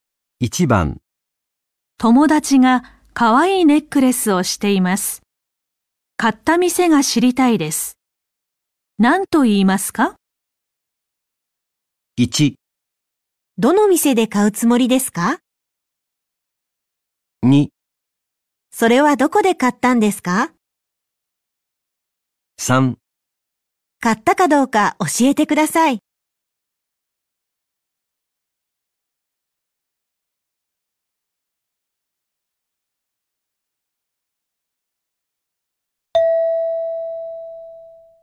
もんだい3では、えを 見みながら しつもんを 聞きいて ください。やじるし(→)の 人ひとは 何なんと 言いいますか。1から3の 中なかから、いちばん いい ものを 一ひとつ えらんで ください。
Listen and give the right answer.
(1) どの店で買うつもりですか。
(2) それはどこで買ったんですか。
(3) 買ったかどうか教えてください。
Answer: (2) それはどこで買ったんですか。

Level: N4 Listening · Test 1